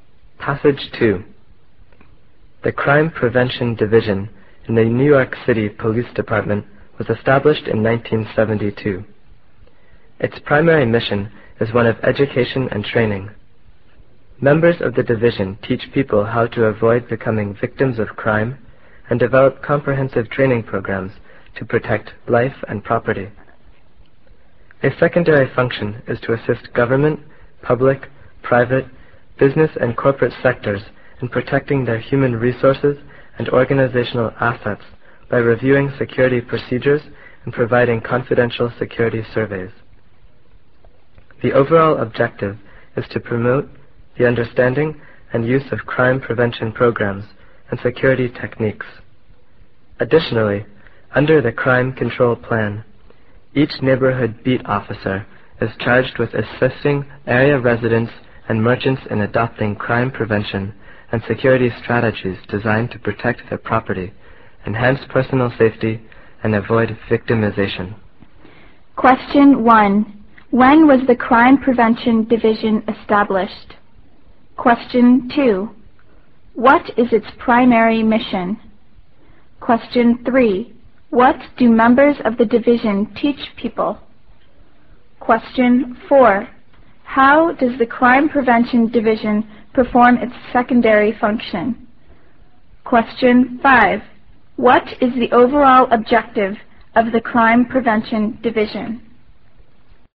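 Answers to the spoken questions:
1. In 1972
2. Education and training
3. How to avoid becoming victims of crime
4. By reviewing security procedures and providing confidential security surveys
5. To promote the understanding and use of crime prevention programs and security techniques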